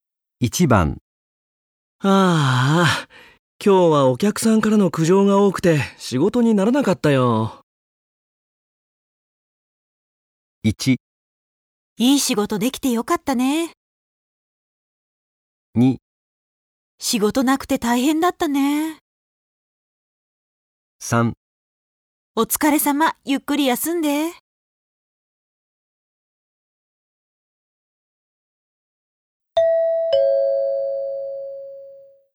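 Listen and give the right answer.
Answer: 3: お疲れ様、ゆっくり休んで。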